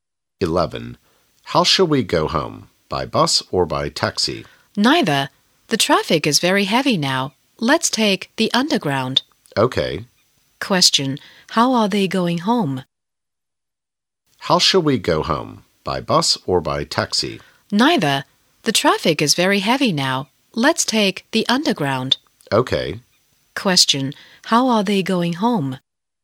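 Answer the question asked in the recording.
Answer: By underground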